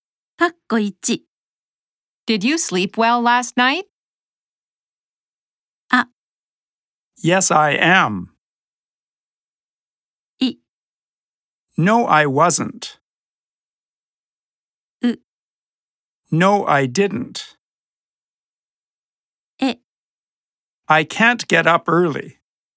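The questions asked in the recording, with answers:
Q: Did you sleep well last night?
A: U: No, I didn't.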